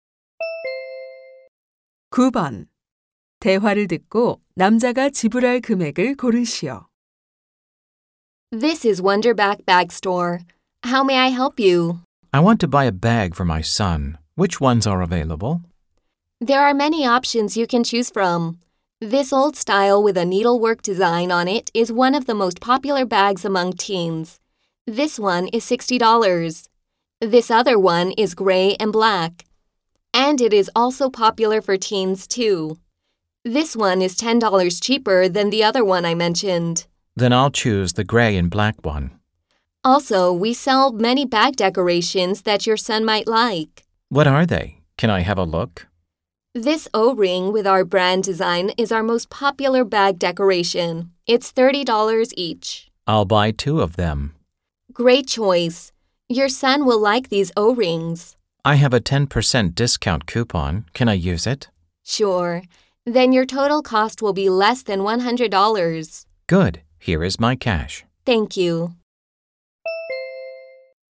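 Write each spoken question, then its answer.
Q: 대화를 듣고 남자가 지불할 금액을 고르시오.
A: $99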